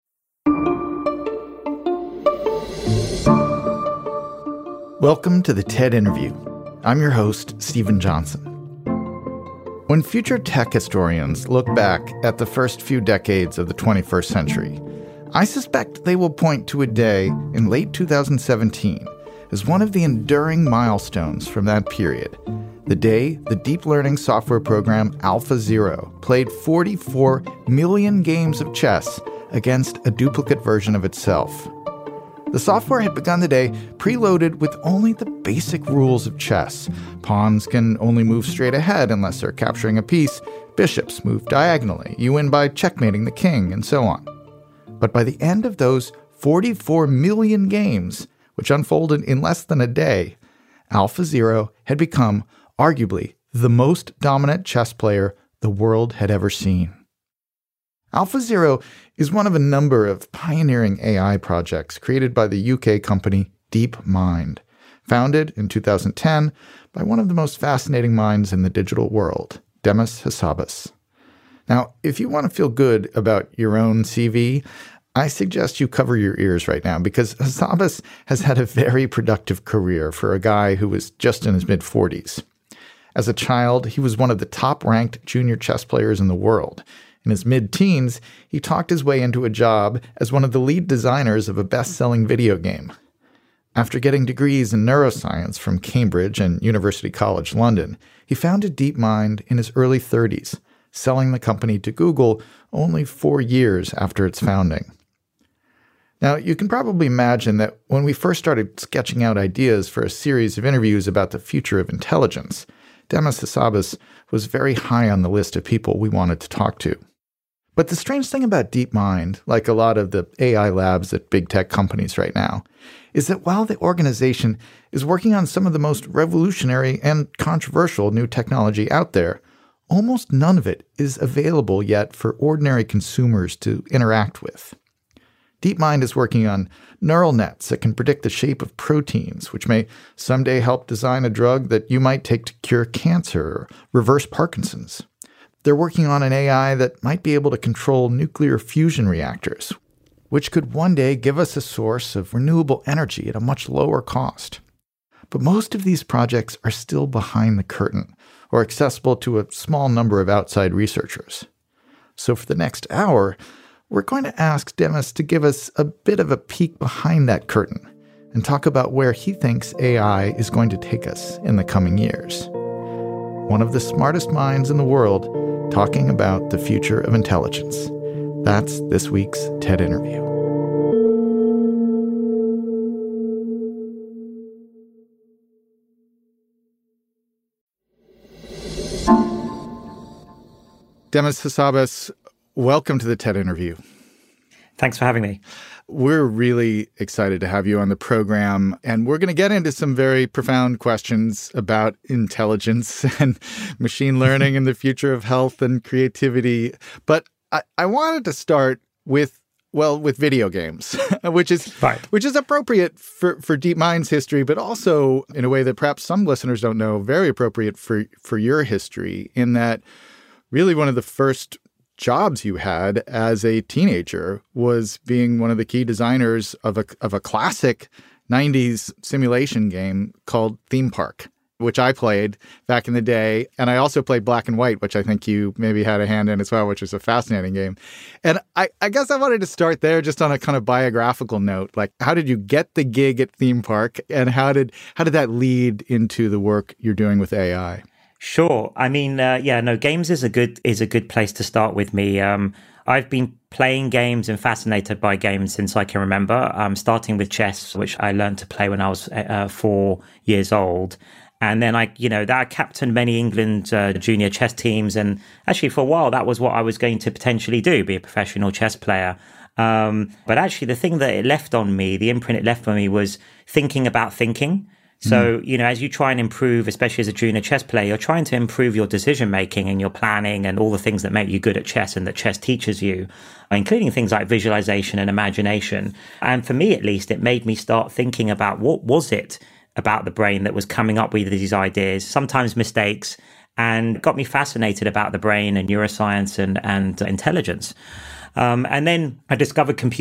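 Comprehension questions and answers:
用 1-2 句话用自己的话回答下面的问题。点「✨ AI 判断」后,AI 会对照当天 transcript 给出参考要点与评分。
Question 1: What specific event in late 2017 does Steven Johnson cite as a major milestone in AI history, and how many games of chess did the software play against itself?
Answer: AlphaZero playing chess against a copy of itself; it played 44 million games.

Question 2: According to Steven Johnson, what two specific diseases might the AI-designed drugs help cure or reverse in the future?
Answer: Cancer (cure) and Parkinson's (reverse).

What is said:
Welcome to the TED Interview. I'm your host, Steven Johnson. When future tech historians look back at the first few decades of the 21st century, I suspect they will point to a day in late 2017 as one of the enduring milestones from that period. The day the deep learning software program, AlphaZero played 44 million games of chess against a duplicate version of itself.
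The software had begun the day preloaded with only the basic rules of chess. Pawns can only move straight ahead unless they're capturing a piece. Bishops move diagonally. You win by checkmating the king, and so on. But by the end of those 44 million games, which unfolded in less than a day, AlphaZero had become arguably the most dominant chess player the world had ever seen.
AlphaZero is one of a number of pioneering AI projects created by the UK company, DeepMind, founded in 2010 by one of the most fascinating minds in the digital world, Demis Hassabis. Now, if you wanna feel good about your own CV, I suggest you cover your ears right now because Hassabis has had a very productive career for a guy who is just in his mid-forties.
As a child, he was one of the top-ranked junior chess players in the world. In his mid-teens, he talked his way into a job as one of the lead designers of a best-selling video game. 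After getting degrees in neuroscience from Cambridge and University College - London, he founded DeepMind in his early thirties, selling the company to Google only four years after its founding.
Now, you can probably imagine that when we first started sketching out ideas for a series of interviews about the future of intelligence, Demis Hassabis was very high on the list of people we wanted to talk to. But the strange thing about DeepMind, like a lot of the AI labs at big tech companies right now, is that while the organization is working on some of the most revolutionary and controversial new technology out there, almost none of it is available yet for ordinary consumers to interact with.
DeepMind is working on neural nets that can predict the shape of proteins, which may someday help design a drug that you might take to cure cancer or reverse Parkinson's.
One of the smartest minds in the world talking about the future of intelligence.
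They're working on an AI that might be able to control nuclear fusion reactors, which could one day give us a source of renewable energy at a much lower cost.
But most of these projects are still behind the curtain or accessible to a small number of outside researchers. So for the next hour, we're going to ask Demis to give us a bit of a peek behind that curtain and talk about where he thinks AI is going to take us in the coming years.
That's this week's TED interview.
[0003:15] Steven Johnson: We're really excited to have you on the program, and we're gonna get into some very profound questions about intelligence and machine learning and the future of health and creativity. But, I wanted to start with, well, with video games, which is fine, which is appropriate for, for DeepMind's history, but also in a way that perhaps some listeners don't know very appropriate for, for your history in that really one of the first jobs you had as a teenager was being one of the key designers of a, of a classic nineties simulation game called Theme Park, which I played back in the day, and I also played Black and White, which I think you maybe had a hand in as well, which is a fascinating game.
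And I, I guess I wanted to start there just on a kind of biographical note, like how did you get the gig at Theme Park, and how did, how did that lead into the work you're doing with AI?
[0004:08] Demis Hassabis: Sure. I mean, uh, yeah, no games is a good, is a good place to start with me. Um, I've been playing games and fascinated by games since I can remember, um, starting with chess, which I learned to play when I was, uh, four years old. And then I, you know, that captained many England, uh, junior chess teams. And actually, for a while, that was what I was going to potentially do, be a professional chess player.
Um, but actually the thing that it left on me, the imprint it left on me was thinking about thinking. So you know, as you try and improve, especially as a junior chess player, you're trying to improve your decision-making and your planning and all the things that make you good at chess, and that chess teaches you, including things like visualization and imagination.
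And for me at least, it made me start thinking about what was it about the brain that was coming up with these ideas, sometimes mistakes, and got me fascinated about the brain and neuroscience and, and intelligence.

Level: CEFRB2-C1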